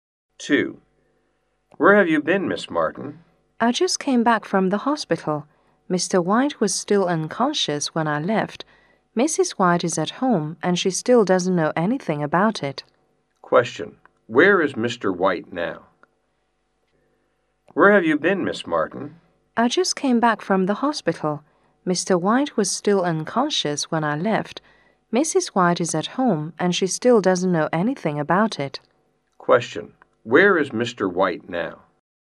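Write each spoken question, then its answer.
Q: Where is Mr. White now?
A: In the hospital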